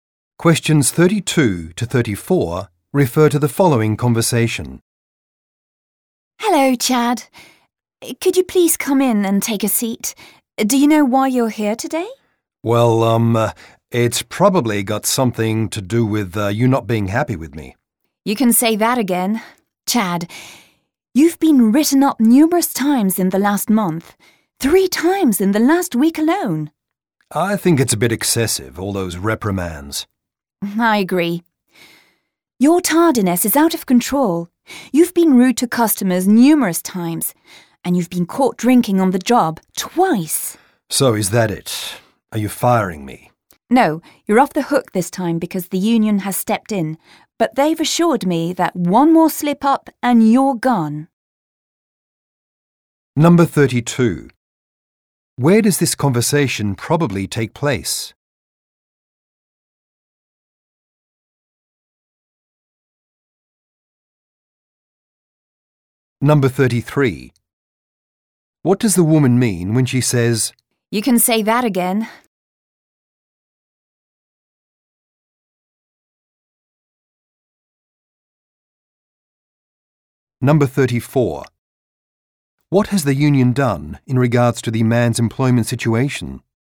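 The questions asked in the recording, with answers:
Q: What does the woman mean when she says, "You can say that again"?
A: She strongly agrees that she is unhappy with him

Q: What has the union done in regards to the man's employment situation?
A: It stepped in and kept him from being fired this time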